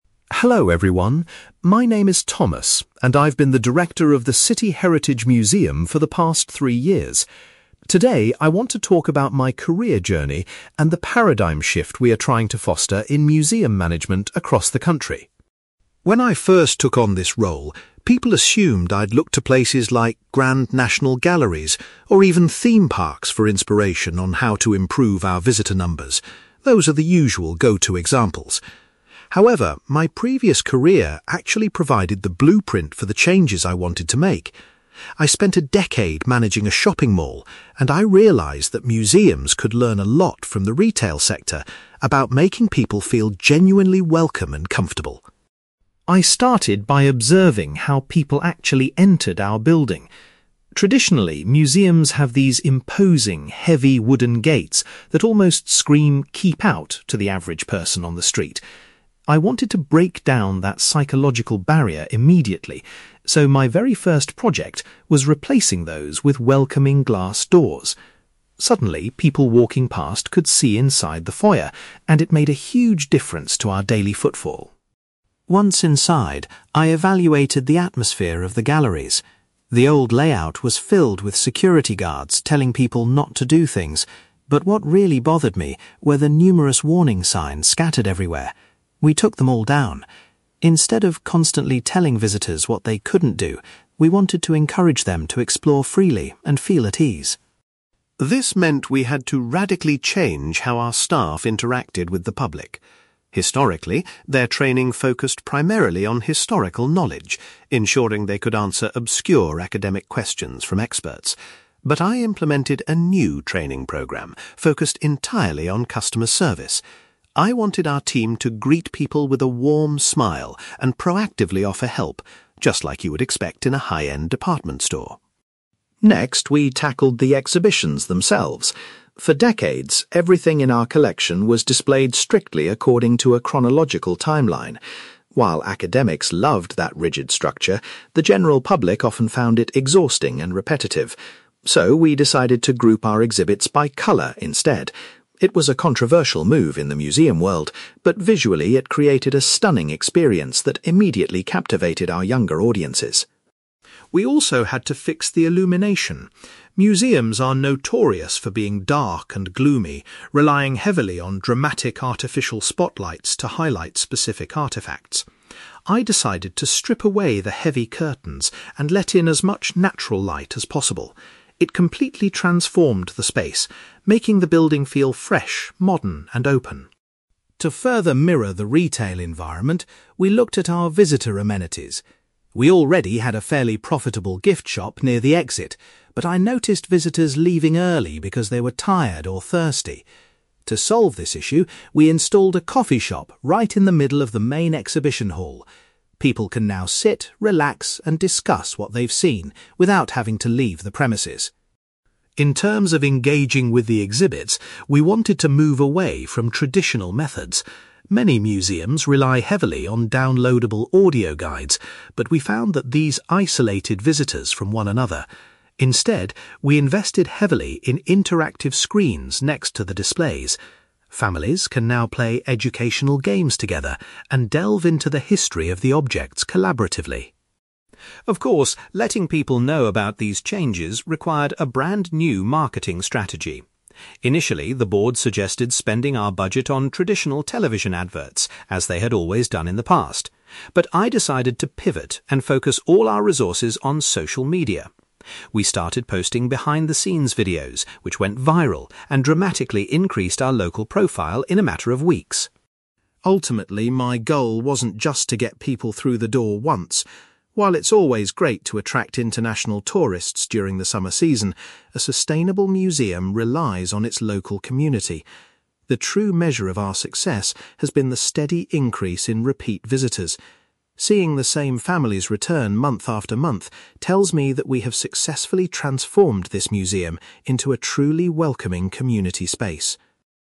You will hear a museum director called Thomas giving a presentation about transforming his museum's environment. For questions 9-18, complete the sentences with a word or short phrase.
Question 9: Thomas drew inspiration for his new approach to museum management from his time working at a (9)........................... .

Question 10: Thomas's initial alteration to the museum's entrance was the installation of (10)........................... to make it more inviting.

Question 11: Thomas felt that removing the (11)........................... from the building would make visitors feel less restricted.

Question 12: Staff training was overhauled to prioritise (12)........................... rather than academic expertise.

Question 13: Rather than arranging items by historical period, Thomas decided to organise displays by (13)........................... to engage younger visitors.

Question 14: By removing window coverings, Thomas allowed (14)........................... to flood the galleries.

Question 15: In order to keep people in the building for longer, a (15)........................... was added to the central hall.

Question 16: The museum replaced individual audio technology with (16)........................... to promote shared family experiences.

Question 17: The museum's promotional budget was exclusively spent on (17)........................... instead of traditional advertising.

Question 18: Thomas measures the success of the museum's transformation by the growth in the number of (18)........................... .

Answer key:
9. shopping mall
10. glass doors
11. warning signs
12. customer service
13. colour
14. natural light
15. coffee shop
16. interactive screens
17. social media
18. repeat visitors

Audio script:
Thomas: Hello everyone. My name is Thomas, and I've been the director of the City Heritage Museum for the past three years. Today, I want to talk about my career journey and the paradigm shift we are trying to foster in museum management across the country.
When I first took on this role, people assumed I'd look to places like grand national galleries or even theme parks for inspiration on how to improve our visitor numbers. Those are the usual go-to examples. However, my previous career actually provided the blueprint for the changes I wanted to make. I spent a decade managing a shopping mall, and I realised that museums could learn a lot from the retail sector about making people feel genuinely welcome and comfortable.
I started by observing how people actually entered our building. Traditionally, museums have these imposing, heavy wooden gates that almost scream "keep out" to the average person on the street. I wanted to break down that psychological barrier immediately, so my very first project was replacing those with welcoming glass doors. Suddenly, people walking past could see inside the foyer, and it made a huge difference to our daily footfall.
Once inside, I evaluated the atmosphere of the galleries. The old layout was filled with security guards telling people not to do things, but what really bothered me were the numerous warning signs scattered everywhere. We took them all down. Instead of constantly telling visitors what they couldn't do, we wanted to encourage them to explore freely and feel at ease.
This meant we had to radically change how our staff interacted with the public. Historically, their training focused primarily on historical knowledge, ensuring they could answer obscure academic questions from experts. But I implemented a new training programme focused entirely on customer service. I wanted our team to greet people with a warm smile and proactively offer help, just like you would expect in a high-end department store.
Next, we tackled the exhibitions themselves. For decades, everything in our collection was displayed strictly according to a chronological timeline. While academics loved that rigid structure, the general public often found it exhausting and repetitive. So, we decided to group our exhibits by colour instead. It was a controversial move in the museum world, but visually, it created a stunning experience that immediately captivated our younger audiences.
We also had to fix the illumination. Museums are notorious for being dark and gloomy, relying heavily on dramatic artificial spotlights to highlight specific artifacts. I decided to strip away the heavy curtains and let in as much natural light as possible. It completely transformed the space, making the building feel fresh, modern, and open.
To further mirror the retail environment, we looked at our visitor amenities. We already had a fairly profitable gift shop near the exit, but I noticed visitors leaving early because they were tired or thirsty. To solve this issue, we installed a coffee shop right in the middle of the main exhibition hall. People can now sit, relax, and discuss what they've seen without having to leave the premises.
In terms of engaging with the exhibits, we wanted to move away from traditional methods. Many museums rely heavily on downloadable audio guides, but we found that these isolated visitors from one another. Instead, we invested heavily in interactive screens next to the displays. Families can now play educational games together and delve into the history of the objects collaboratively.
Of course, letting people know about these changes required a brand new marketing strategy. Initially, the board suggested spending our budget on traditional television adverts, as they had always done in the past. But I decided to pivot and focus all our resources on social media. We started posting behind-the-scenes videos, which went viral and dramatically increased our local profile in a matter of weeks.
Ultimately, my goal wasn't just to get people through the door once. While it's always great to attract international tourists during the summer season, a sustainable museum relies on its local community. The true measure of our success has been the steady increase in repeat visitors. Seeing the same families return month after month tells me that we have successfully transformed this museum into a truly welcoming community space.

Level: B2